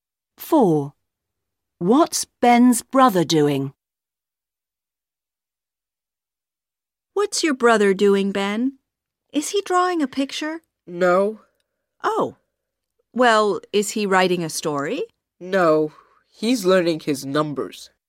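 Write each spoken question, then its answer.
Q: What's Ben's brother doing?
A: learning his numbers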